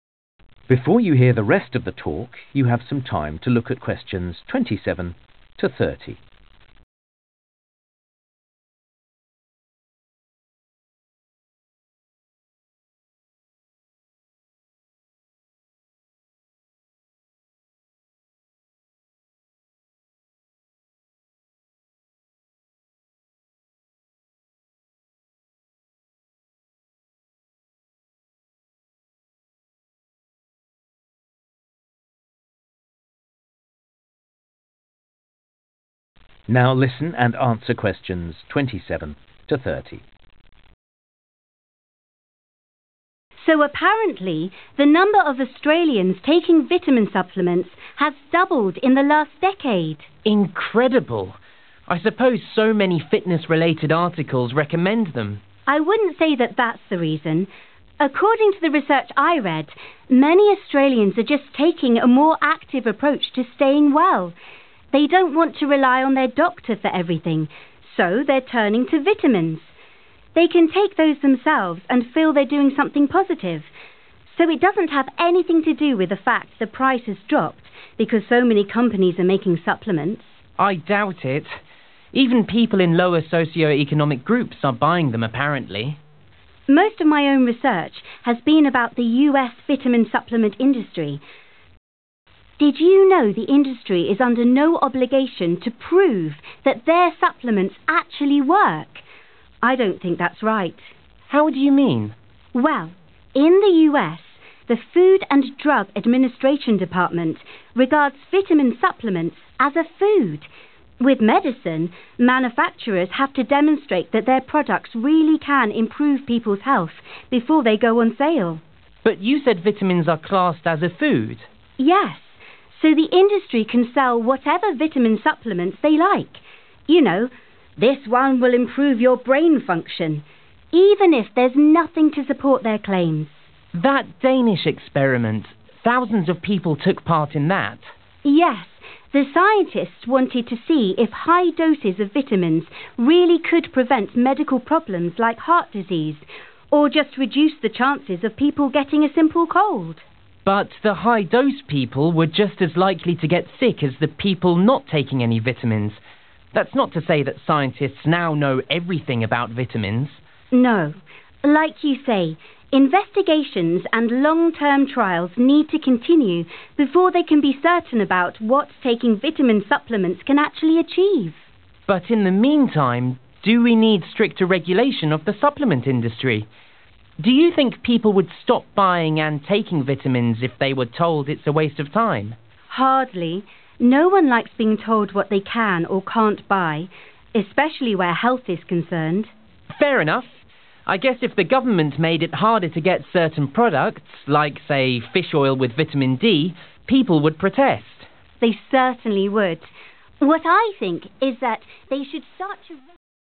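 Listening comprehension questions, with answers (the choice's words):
Questions 27-30. Choose the correct letter, A, B or C.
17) Sam believes that more Australians are taking vitamin supplements because they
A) want to have control of their own health.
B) are advised to by local health authorities.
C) have benefitted from competition amongst manufactures.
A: want to have control of their own health.

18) Lucy is concerned that the US vitamin supplements industry is not required to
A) follow the guidelines produced by a government agency.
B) list all the possible side effects of taking vitamins.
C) provide evidence that their products are effective.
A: provide evidence that their products are effective.

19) When discussing the Danish experiment, Lucy and Sam conclude that vitamin supplements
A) are best used for preventing minor illnesses.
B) are not fully understood by researchers.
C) are harmful if taken in large amounts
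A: are not fully understood by researchers.

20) Lucy and Sam agree that stricter regulation of the vitamin supplement industry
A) would only lead to a slight decrease in sales.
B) might be necessary for some types of vitamin.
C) may not be welcome by all consumers.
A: may not be welcome by all consumers.

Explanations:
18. Lucy: Most of my own research has been about the US vitamin supplement industry. Did you know the industry is under no obligation to prove that their supplements actually work (Hầu hết các nghiên cứu của riêng tôi là về ngành công nghiệp bổ sung vitamin của Hoa Kỳ. Bạn có biết ngành công nghiệp không có nghĩa vụ phải chứng minh rằng các chất bổ sung của họ thực sự hoạt động). I don't think that's right.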